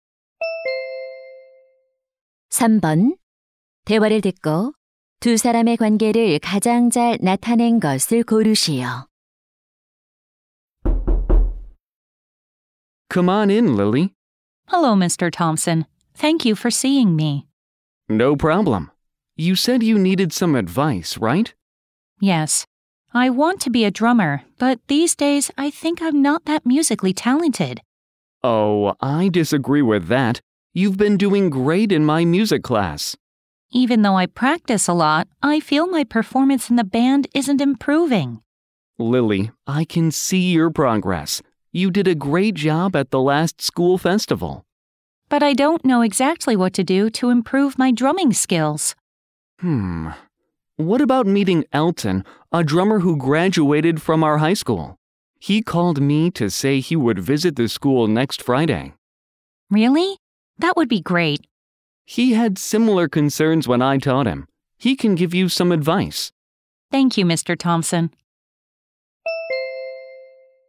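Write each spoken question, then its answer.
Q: 대화를 듣고 두 사람의 관계를 가장 잘 나타낸 것을 고르시오.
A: 학생 - 음악 교사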